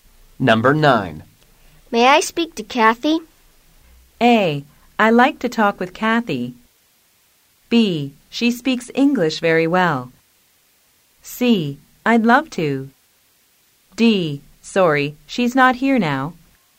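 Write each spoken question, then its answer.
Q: May I speak to Kathy?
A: D: Sorry, she's not here now.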